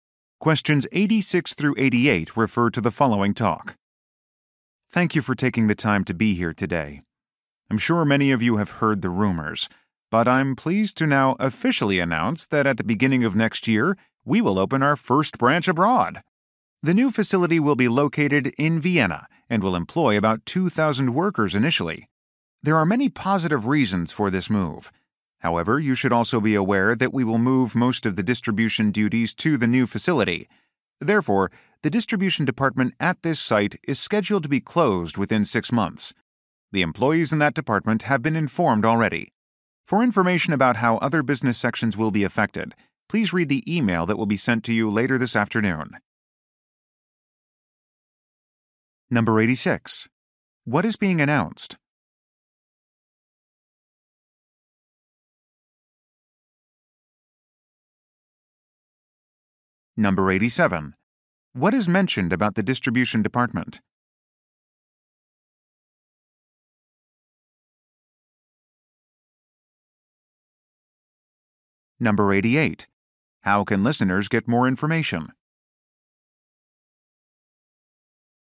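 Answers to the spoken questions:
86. The opening of the company's first branch abroad
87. It will be closed within 6 months
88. By reading an email sent later that afternoon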